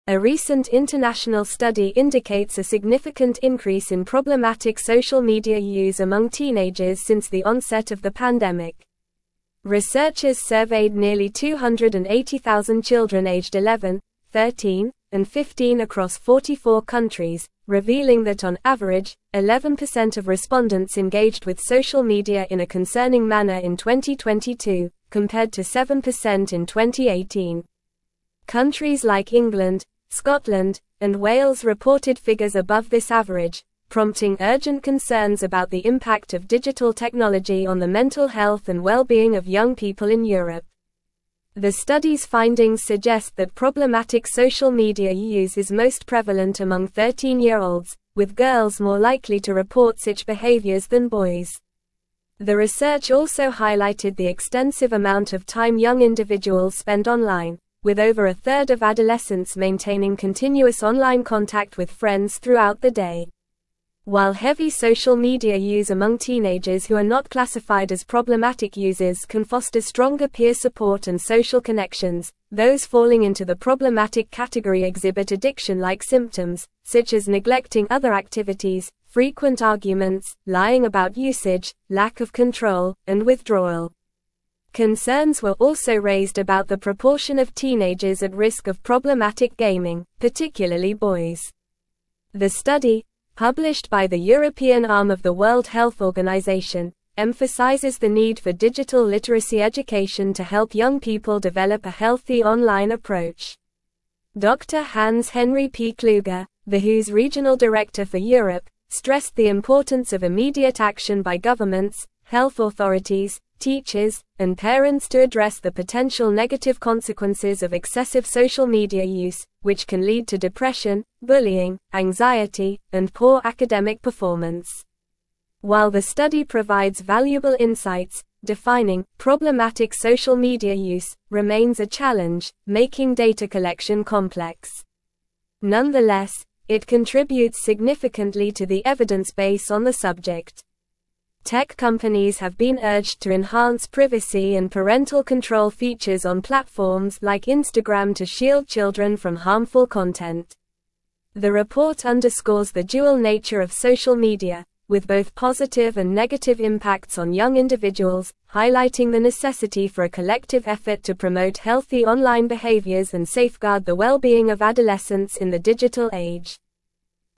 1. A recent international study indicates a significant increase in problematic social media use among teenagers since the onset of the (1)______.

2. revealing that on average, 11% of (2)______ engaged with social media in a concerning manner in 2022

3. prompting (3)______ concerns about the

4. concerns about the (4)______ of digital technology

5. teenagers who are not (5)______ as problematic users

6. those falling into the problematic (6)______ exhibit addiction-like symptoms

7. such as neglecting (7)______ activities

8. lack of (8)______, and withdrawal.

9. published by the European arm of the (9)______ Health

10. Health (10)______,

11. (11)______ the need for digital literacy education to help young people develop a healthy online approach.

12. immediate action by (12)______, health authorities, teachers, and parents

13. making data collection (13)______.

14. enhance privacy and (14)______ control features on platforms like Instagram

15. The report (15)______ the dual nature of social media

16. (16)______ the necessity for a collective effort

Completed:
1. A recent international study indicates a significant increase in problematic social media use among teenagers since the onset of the pandemic.
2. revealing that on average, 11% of respondents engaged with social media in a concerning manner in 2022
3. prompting urgent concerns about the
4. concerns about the impact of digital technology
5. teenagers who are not classified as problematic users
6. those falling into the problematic category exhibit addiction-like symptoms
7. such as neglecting other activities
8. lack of control, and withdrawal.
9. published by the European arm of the World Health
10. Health Organization,
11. emphasizes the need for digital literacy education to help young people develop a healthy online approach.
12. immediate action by governments, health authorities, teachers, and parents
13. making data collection complex.
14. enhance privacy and parental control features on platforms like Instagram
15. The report underscores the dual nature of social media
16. highlighting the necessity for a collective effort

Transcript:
A recent international study indicates a significant increase in problematic social media use among teenagers since the onset of the pandemic. Researchers surveyed nearly 280,000 children aged 11, 13, and 15 across 44 countries, revealing that on average, 11% of respondents engaged with social media in a concerning manner in 2022, compared to 7% in 2018. Countries like England, Scotland, and Wales reported figures above this average, prompting urgent concerns about the impact of digital technology on the mental health and well-being of young people in Europe.
The study's findings suggest that problematic social media use is most prevalent among 13-year-olds, with girls more likely to report such behaviors than boys. The research also highlighted the extensive amount of time young individuals spend online, with over a third of adolescents maintaining continuous online contact with friends throughout the day. While heavy social media use among teenagers who are not classified as problematic users can foster stronger peer support and social connections, those falling into the problematic category exhibit addiction-like symptoms, such as neglecting other activities, frequent arguments, lying about usage, lack of control, and withdrawal.
Concerns were also raised about the proportion of teenagers at risk of problematic gaming, particularly boys. The study, published by the European arm of the World Health Organization, emphasizes the need for digital literacy education to help young people develop a healthy online approach. Dr. Hans Henri P Kluge, the WHO's regional director for Europe, stressed the importance of immediate action by governments, health authorities, teachers, and parents to address the potential negative consequences of excessive social media use, which can lead to depression, bullying, anxiety, and poor academic performance.
While the study provides valuable insights, defining "problematic social media use" remains a challenge, making data collection complex. Nonetheless, it contributes significantly to the evidence base on the subject. Tech companies have been urged to enhance privacy and parental control features on platforms like Instagram to shield children from harmful content. The report underscores the dual nature of social media, with both positive and negative impacts on young individuals, highlighting the necessity for a collective effort to promote healthy online behaviors and safeguard the well-being of adolescents in the digital age.

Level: Level 4